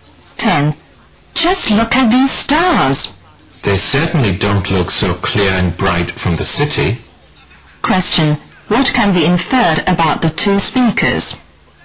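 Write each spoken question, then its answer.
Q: What can be inferred about the two speakers?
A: They are out of the city, in the countryside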